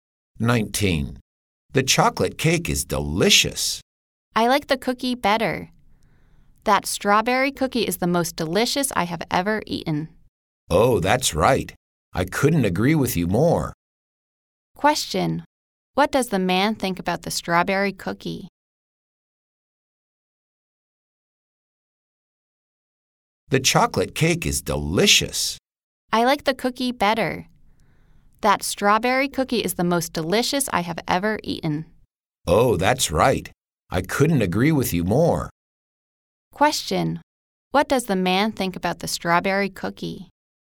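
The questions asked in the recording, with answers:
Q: What does the man think about the strawberry cookie?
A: It is the most delicious he has ever eaten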